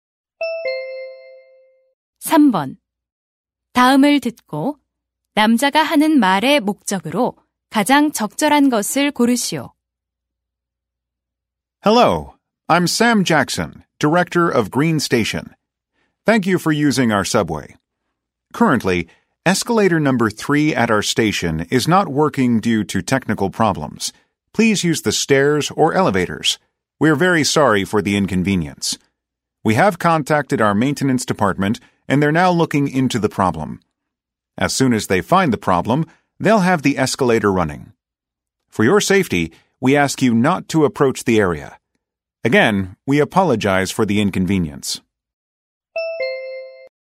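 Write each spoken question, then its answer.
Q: 다음을 듣고 남자가 하는 말의 목적으로 가장 적절한 것을 고르시오.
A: 3번 에스컬레이터 고장을 안내하려고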